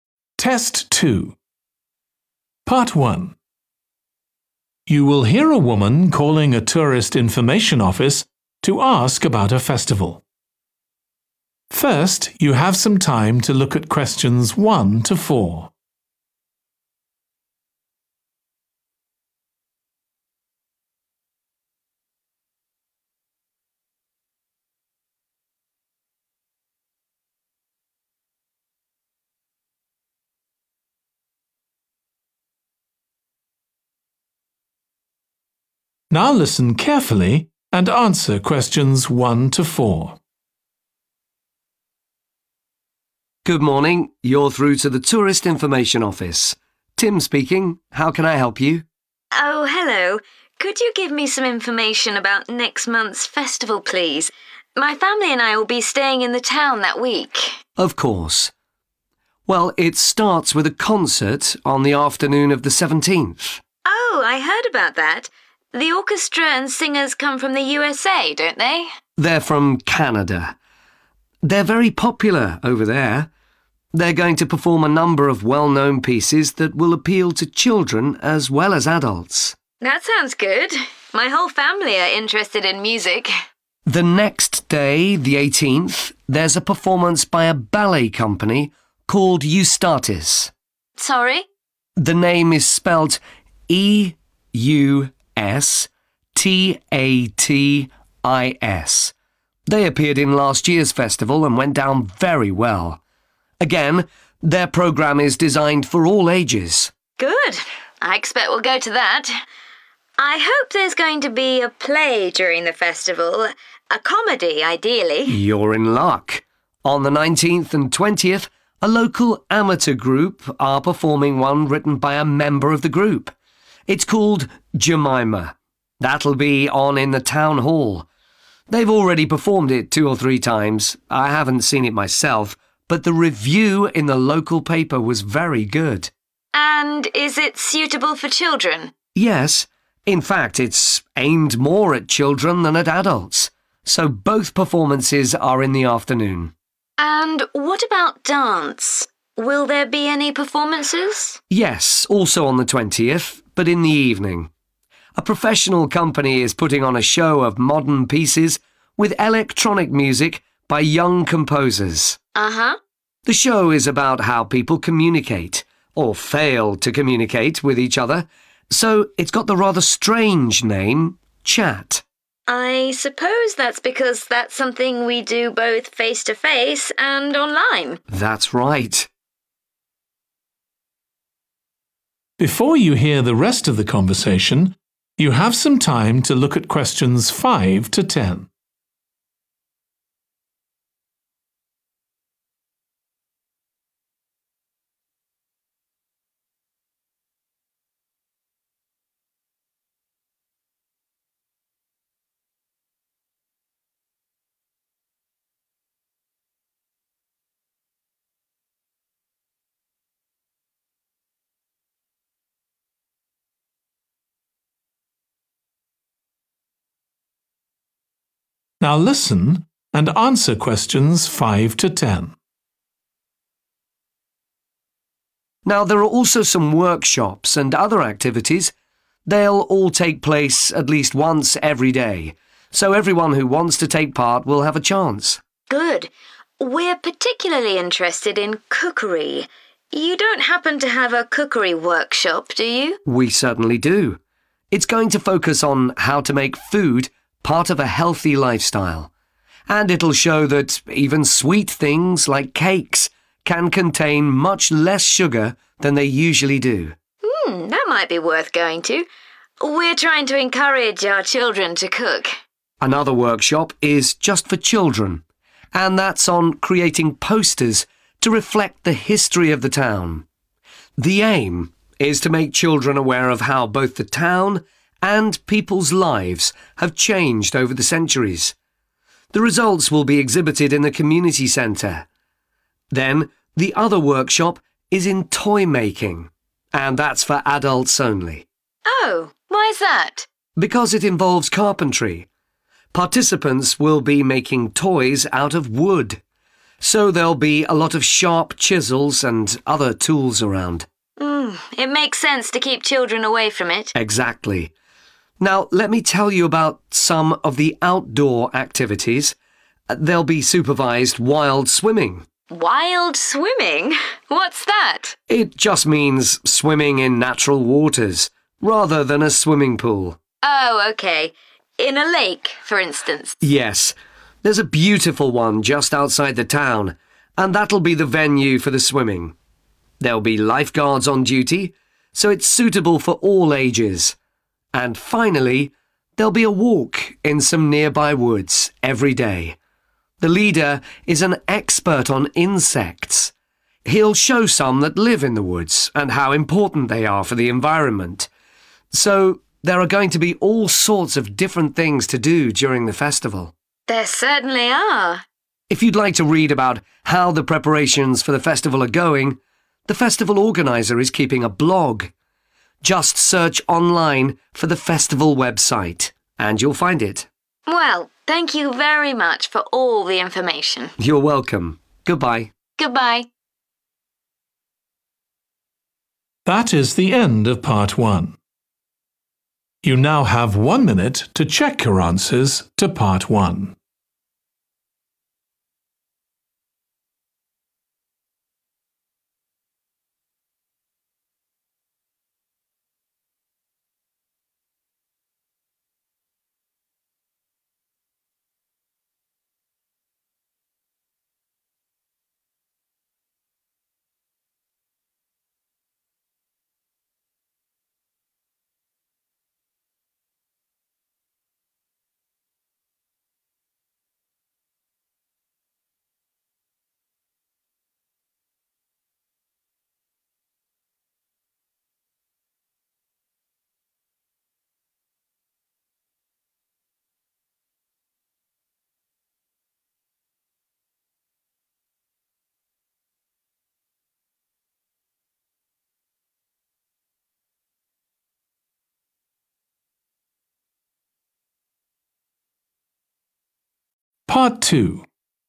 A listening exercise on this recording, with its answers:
Complete the table below. Write ONE WORD ONLY for each answer.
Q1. 18th a ballet company called 1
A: Eustatis

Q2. Jemima has had a good 2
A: review

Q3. 20th (evening) a 3 show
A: dance

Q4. show is called 4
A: Chat

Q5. Making 5. food – (children only)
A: healthy

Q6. Making 6. – (adults only)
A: posters

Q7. Making toys from 7. using various tools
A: wood

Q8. Swimming in the 8.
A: lake

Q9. Walking in the woods, led by an expert on 9.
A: insects

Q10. See the festival organiser's 10. for more information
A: blog